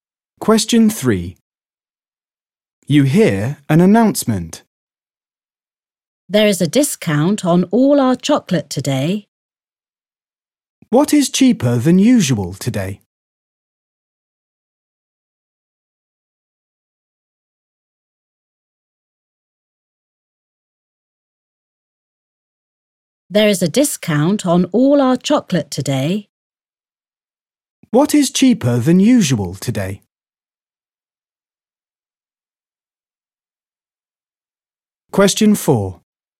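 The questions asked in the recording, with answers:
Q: What is cheaper than usual today?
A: chocolate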